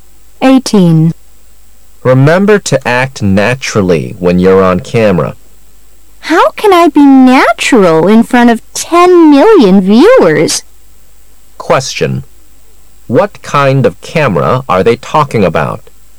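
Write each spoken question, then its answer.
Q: What kind of camera are they talking about?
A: A television camera

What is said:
[解析] M: Remember to act naturally when you're on camera. W: How can I be natural in front of 10 million viewers? Q: What kind of camera are they talking about?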